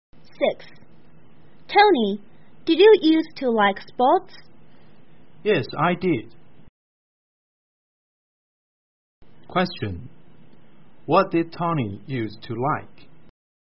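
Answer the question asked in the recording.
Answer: Sports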